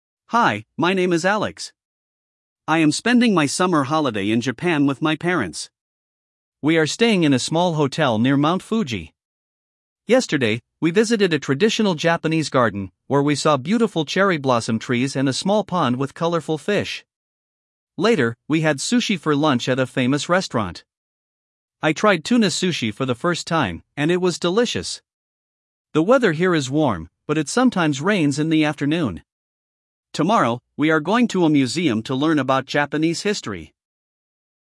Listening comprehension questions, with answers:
1. Прослушайте текст и определите, какие из приведённых утверждений A–E соответствуют содержанию текста (1 – Right), какие не соответствуют (2 – False). Вы услышите текст дважды.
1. Alex is spending his holiday in China.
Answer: False

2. He visited a Japanese garden with cherry blossom trees.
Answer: Right

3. He had ramen for lunch at a restaurant.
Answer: False

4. The weather is always sunny and warm.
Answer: False

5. Tomorrow, he will visit a museum.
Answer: Right

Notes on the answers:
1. Alex is in Japan, not China.
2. He visited a Japanese garden with cherry blossom trees.
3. He had sushi, not ramen.
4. The weather is warm, but it sometimes rains.
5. He will visit a museum tomorrow.

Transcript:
Hi, my name is Alex. I am spending my summer holiday in Japan with my parents. We are staying in a small hotel near Mount Fuji. Yesterday, we visited a traditional Japanese garden, where we saw beautiful cherry blossom trees and a small pond with colorful fish. Later, we had sushi for lunch at a famous restaurant. I tried tuna sushi for the first time, and it was delicious! The weather here is warm, but it sometimes rains in the afternoon. Tomorrow, we are going to a museum to learn about Japanese history.

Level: 6 класс